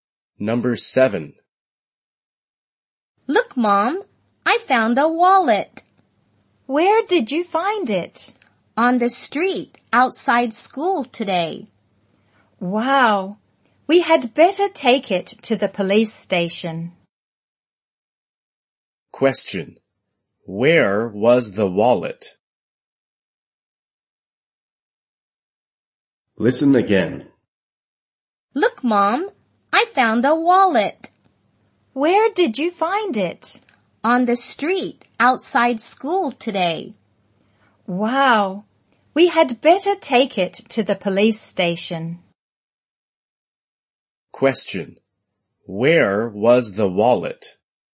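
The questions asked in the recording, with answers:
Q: Where was the wallet?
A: On the street outside school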